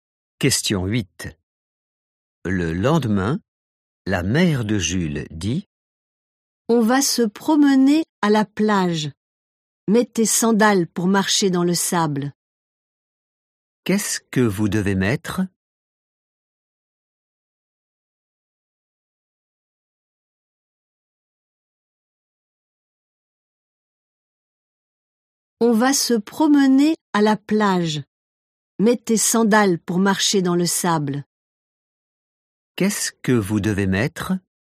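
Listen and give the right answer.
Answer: des sandales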